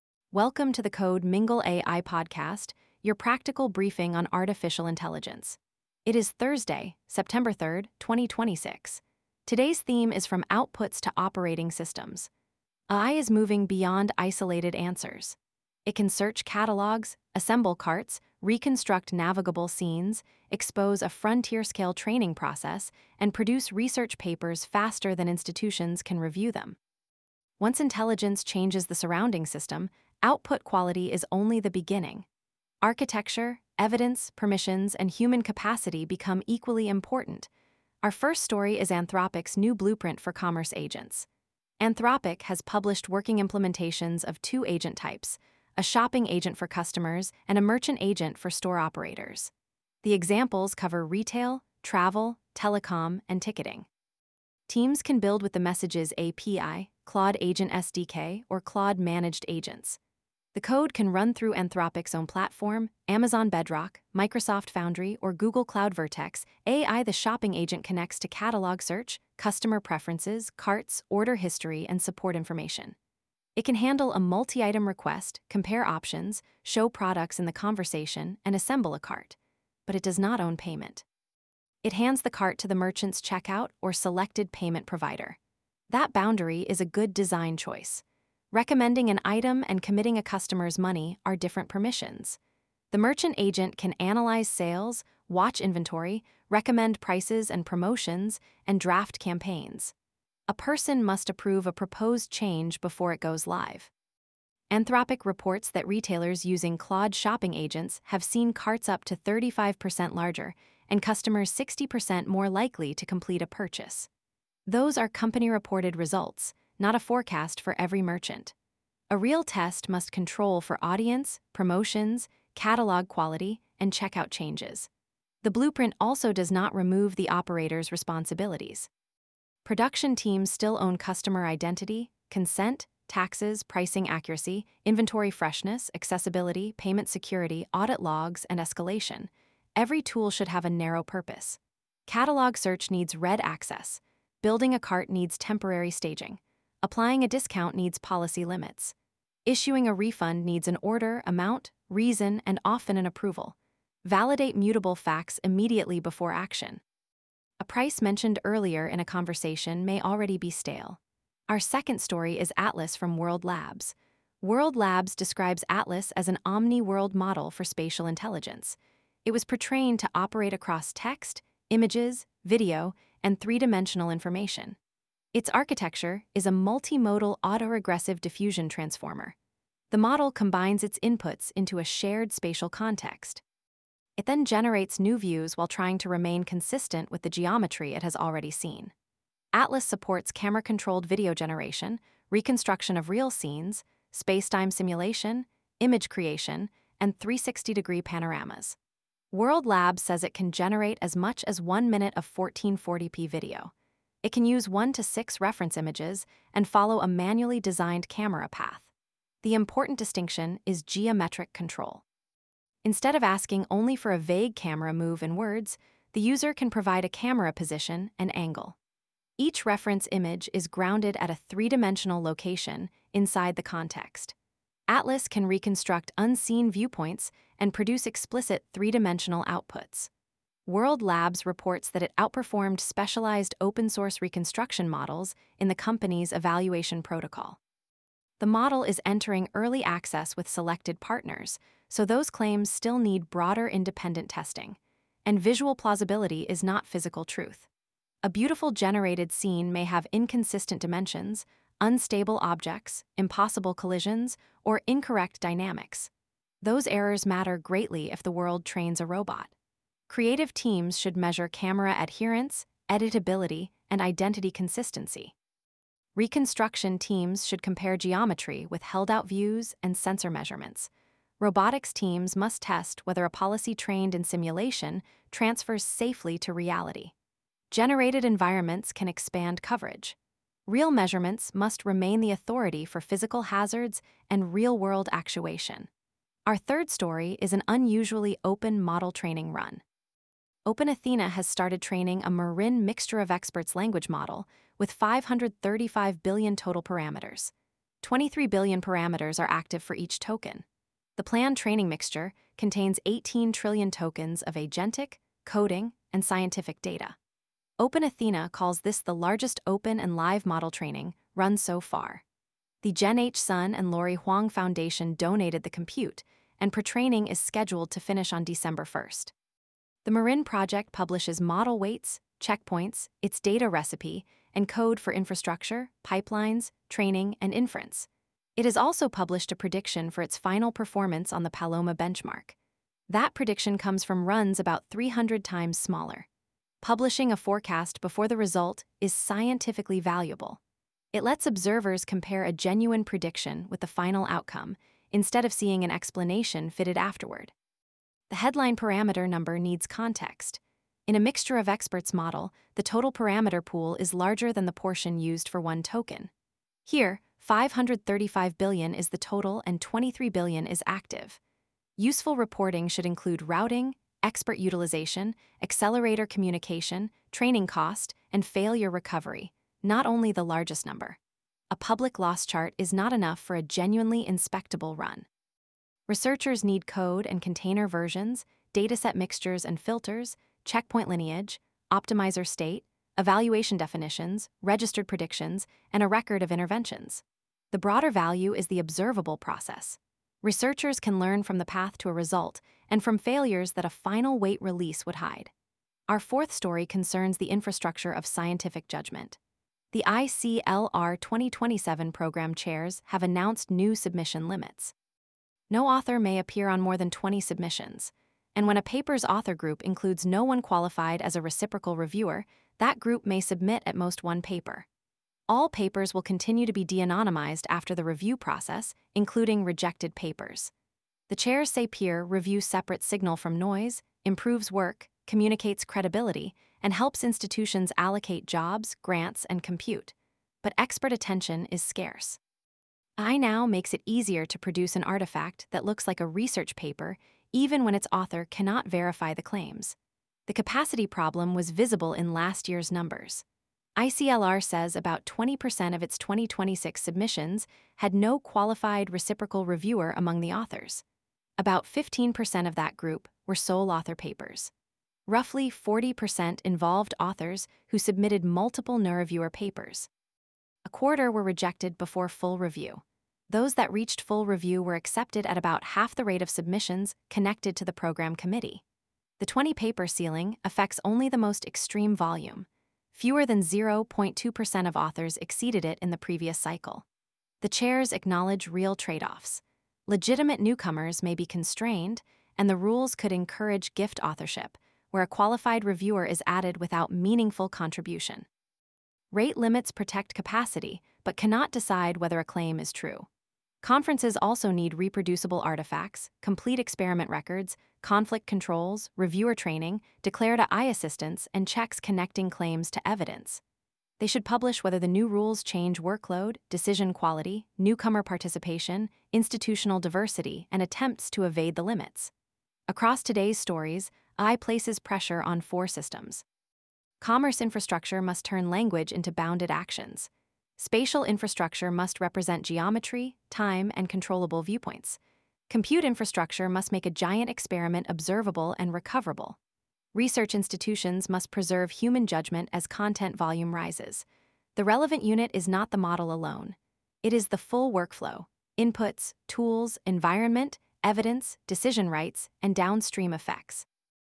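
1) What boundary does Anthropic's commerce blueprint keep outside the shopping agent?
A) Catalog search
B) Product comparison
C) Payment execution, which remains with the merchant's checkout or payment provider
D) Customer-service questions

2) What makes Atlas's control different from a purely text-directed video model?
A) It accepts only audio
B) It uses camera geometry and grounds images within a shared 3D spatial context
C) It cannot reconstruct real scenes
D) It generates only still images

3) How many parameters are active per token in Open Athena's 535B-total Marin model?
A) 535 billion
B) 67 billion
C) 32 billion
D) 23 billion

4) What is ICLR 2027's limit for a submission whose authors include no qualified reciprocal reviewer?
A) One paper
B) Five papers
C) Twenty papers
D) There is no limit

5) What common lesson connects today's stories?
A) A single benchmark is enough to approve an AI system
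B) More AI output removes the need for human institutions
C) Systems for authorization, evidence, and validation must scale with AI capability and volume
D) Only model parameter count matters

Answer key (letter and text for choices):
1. C) Payment execution, which remains with the merchant's checkout or payment provider
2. B) It uses camera geometry and grounds images within a shared 3D spatial context
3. D) 23 billion
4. A) One paper
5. C) Systems for authorization, evidence, and validation must scale with AI capability and volume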